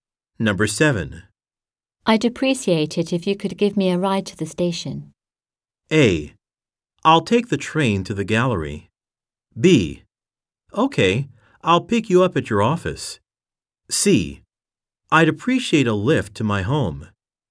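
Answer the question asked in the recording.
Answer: B: Okay, I'll pick you up at your office.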